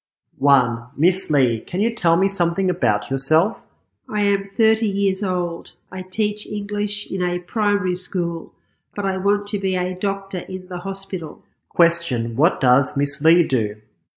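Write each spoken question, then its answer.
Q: Question, what does Miss Lee do?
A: She is an English teacher.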